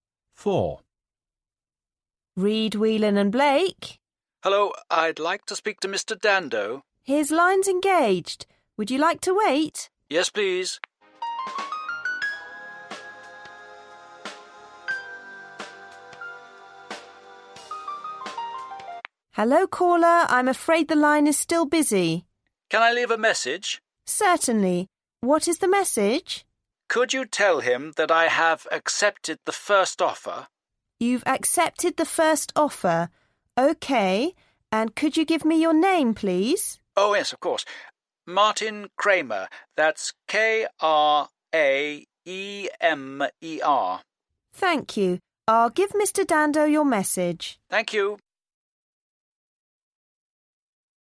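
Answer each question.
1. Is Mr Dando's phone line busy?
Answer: Yes

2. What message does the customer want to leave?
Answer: He has accepted the first offer

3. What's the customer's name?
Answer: Martin Kraemer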